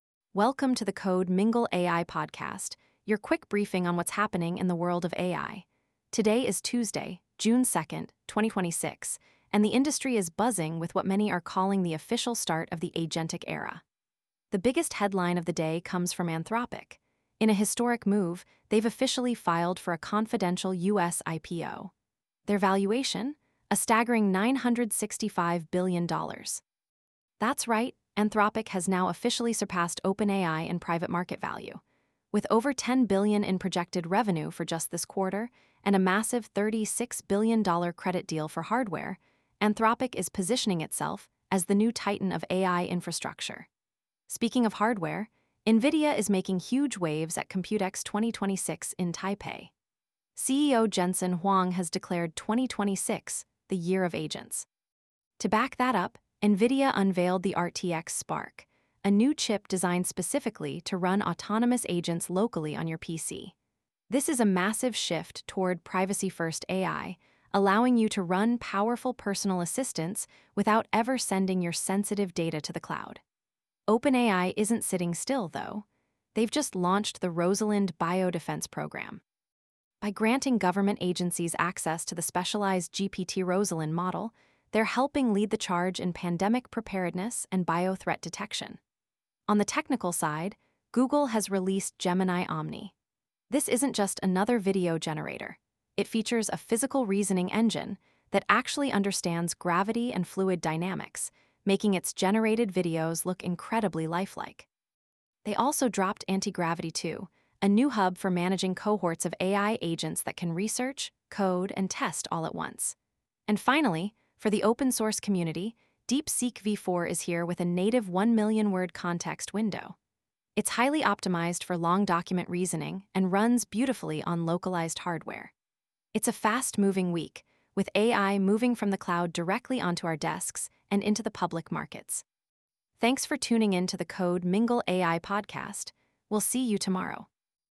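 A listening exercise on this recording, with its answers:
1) Which company officially filed for a confidential IPO on June 1, 2026?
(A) OpenAI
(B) Anthropic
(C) DeepSeek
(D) NVIDIA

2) What is the name of the new NVIDIA chip designed for local agentic AI?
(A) H100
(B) RTX Spark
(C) Vera 1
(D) Blackwell Ultra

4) What is the context window size of the new DeepSeek-V4 model?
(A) 128k words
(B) 500k words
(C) 1 million words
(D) 10 million words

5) Google's 'Antigravity 2.0' is designed for what specific task?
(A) Video Generation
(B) Managing Agent Cohorts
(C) Hardware Simulation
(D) Search Engine Optimization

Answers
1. (B) Anthropic
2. (B) RTX Spark
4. (C) 1 million words
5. (B) Managing Agent Cohorts

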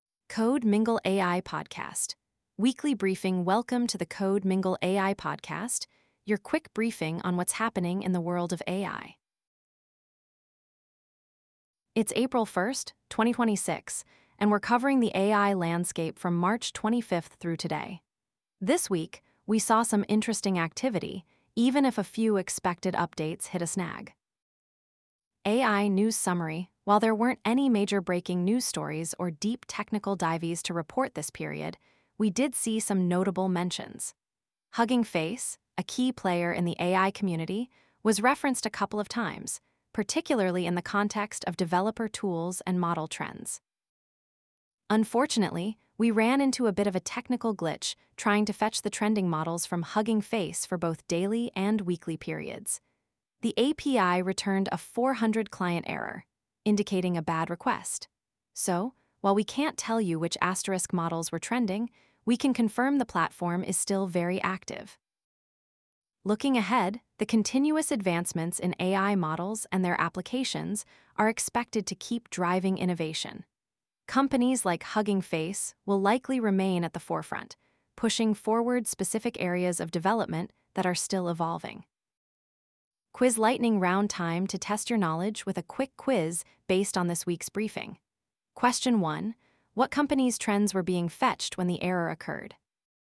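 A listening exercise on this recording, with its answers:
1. What company's trends were being fetched when the error occurred?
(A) Google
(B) OpenAI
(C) Hugging Face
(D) Microsoft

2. What was the HTTP status code for the client error reported?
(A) 200 OK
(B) 400 Client Error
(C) 404 Not Found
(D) 500 Internal Server Error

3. What specific type of models was the API request attempting to retrieve from Hugging Face?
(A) Newest models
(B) Trending models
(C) Most downloaded models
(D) Recommended models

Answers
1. (C) Hugging Face
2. (B) 400 Client Error
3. (B) Trending models

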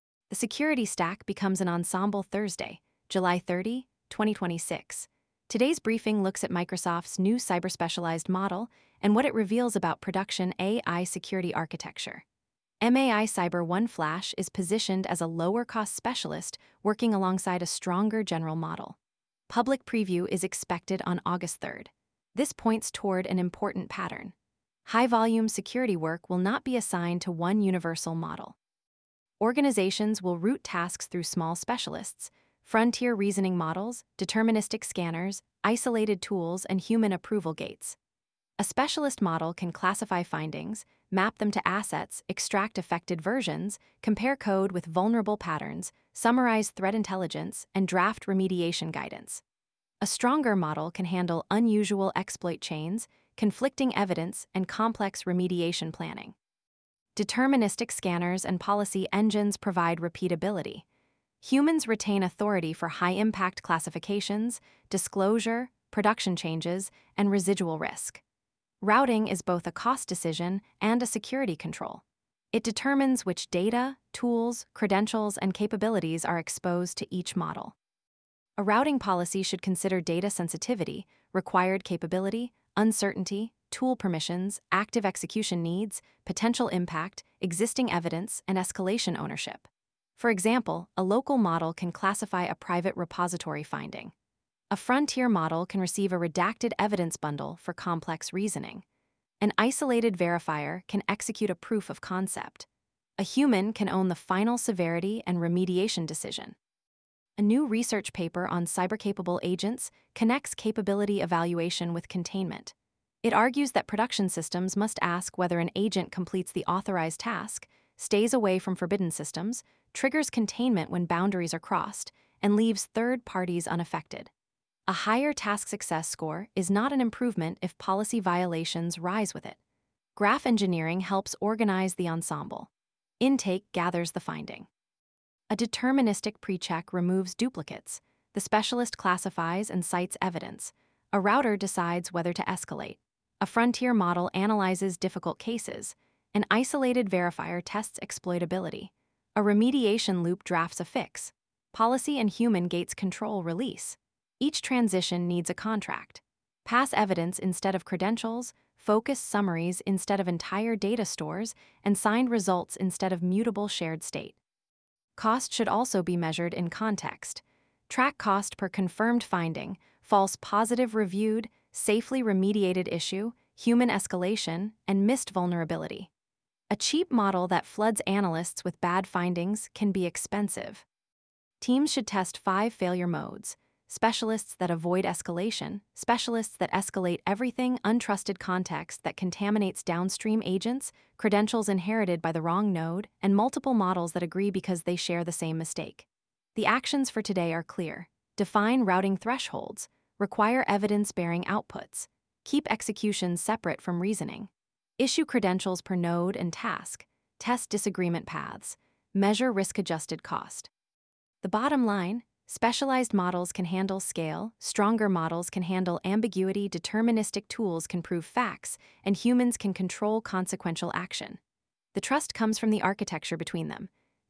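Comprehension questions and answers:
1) What role is MAI-Cyber-1-Flash positioned to play?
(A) A lower-cost cyber-specialised model for high-volume security work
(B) A consumer image-generation model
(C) A replacement for every deterministic scanner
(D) An unrestricted production deployment agent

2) Why is model routing a security control?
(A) It determines which data, tools, capability, and authority are exposed to each model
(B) It only changes the colour of the interface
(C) Every model always receives identical permissions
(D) Routing eliminates the need for audit logs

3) What should deterministic controls own?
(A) Repeatable checks and decisions that can be expressed as rules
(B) All ambiguous security judgement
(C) Unbounded internet exploration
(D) Final acceptance of organisational risk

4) What is authority inheritance?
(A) A downstream node receiving credentials or permissions that it does not need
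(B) A model citing its evidence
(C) A human approving a high-impact action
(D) A scanner producing deterministic output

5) What is the best way to assess model cost in a security ensemble?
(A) Use risk-adjusted cost including false positives, missed findings, reviewer effort, and incident impact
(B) Compare token price alone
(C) Ignore human review time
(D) Always choose the smallest model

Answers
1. (A) A lower-cost cyber-specialised model for high-volume security work
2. (A) It determines which data, tools, capability, and authority are exposed to each model
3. (A) Repeatable checks and decisions that can be expressed as rules
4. (A) A downstream node receiving credentials or permissions that it does not need
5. (A) Use risk-adjusted cost including false positives, missed findings, reviewer effort, and incident impact

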